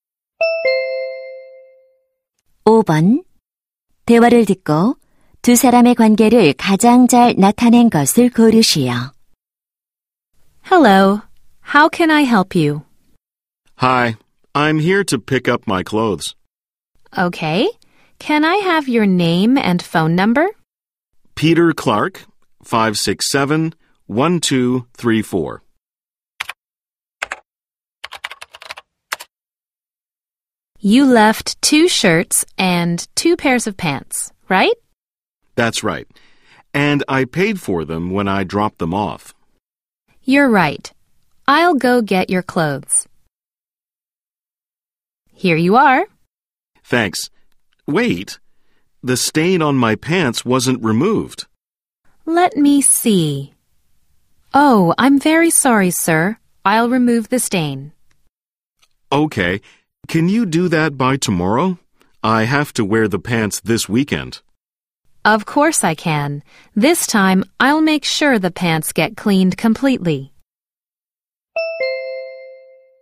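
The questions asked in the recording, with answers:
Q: 대화를 듣고 두 사람의 관계를 가장 잘 나타낸 것을 고르시오.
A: 세탁소 직원과 손님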